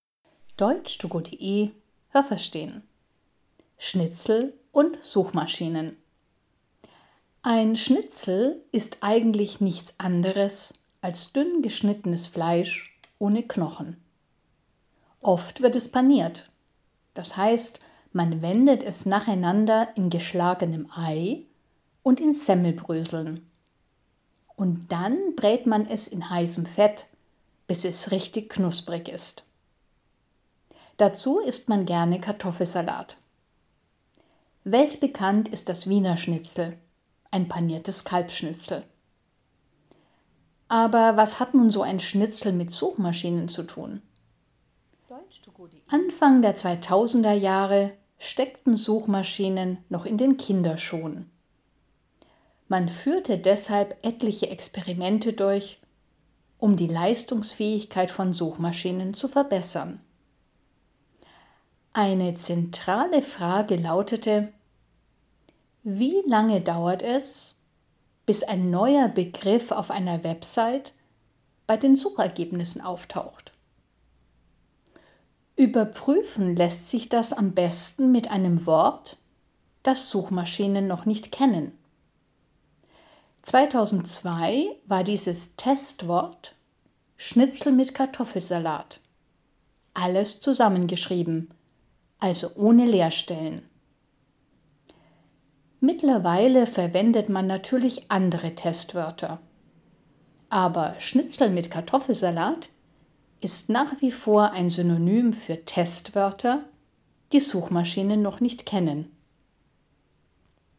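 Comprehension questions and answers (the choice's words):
Was haben Sie gehört? Es gibt nur eine korrekte Antwort.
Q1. Ein Schnitzel hat _____ Knochen.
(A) einen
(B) keinen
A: keinen

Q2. Ein paniertes Schnitzel ist ein Schnitzel, ...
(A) das man in Ei und Semmelbröseln wendet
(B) das man mit gekochten Eiern und Kartoffelsalat isst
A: das man in Ei und Semmelbröseln wendet

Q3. Ein Wiener Schnitzel ist immer ...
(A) Putenfleisch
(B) Kalbfleisch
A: Kalbfleisch

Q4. Anfang der 2000er-Jahre ...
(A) gab es schon Suchmaschinen, die speziell für Kinder geeignet sind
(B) standen Suchmaschinen noch am Anfang ihrer Entwicklung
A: standen Suchmaschinen noch am Anfang ihrer Entwicklung

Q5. Man wollte untersuchen, _____ bei den Suchergebnissen auftauchen.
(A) wie schnell neue Wörter auf einer Website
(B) warum neue Wörter auf einer Website nicht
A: wie schnell neue Wörter auf einer Website

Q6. Man suchte deshalb ein Wort, ...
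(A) das Suchmaschinen schnell finden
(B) das Suchmaschinen noch nicht kennen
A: das Suchmaschinen noch nicht kennen

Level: B1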